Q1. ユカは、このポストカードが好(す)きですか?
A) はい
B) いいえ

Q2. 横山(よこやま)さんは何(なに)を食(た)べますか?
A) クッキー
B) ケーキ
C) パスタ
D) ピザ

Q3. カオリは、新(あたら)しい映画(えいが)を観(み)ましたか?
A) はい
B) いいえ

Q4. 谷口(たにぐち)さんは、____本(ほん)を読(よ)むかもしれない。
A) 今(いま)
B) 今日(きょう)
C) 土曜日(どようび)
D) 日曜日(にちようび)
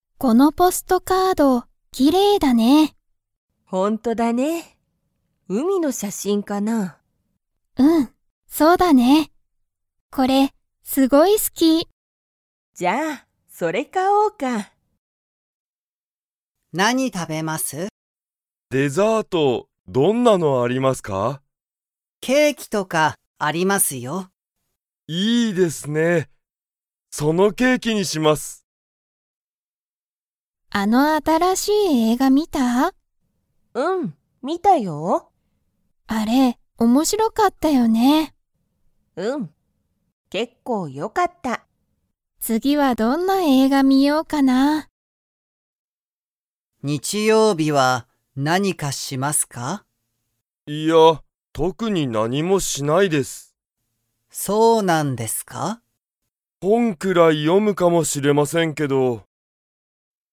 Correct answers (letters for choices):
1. A
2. B
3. A
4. D

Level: Level 1